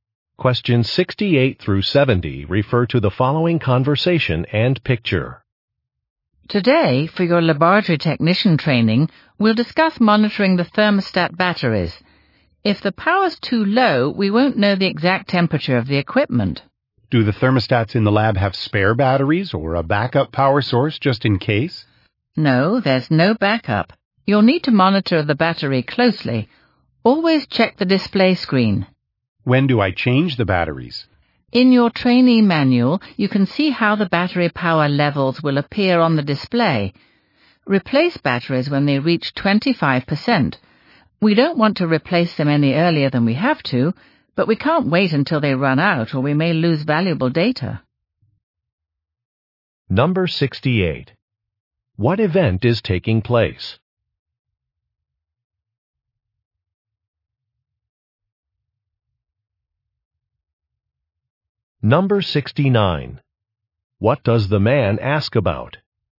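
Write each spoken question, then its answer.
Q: What event is taking place?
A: A laboratory technician training

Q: What does the man ask about?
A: Whether thermostats have spare batteries or backup power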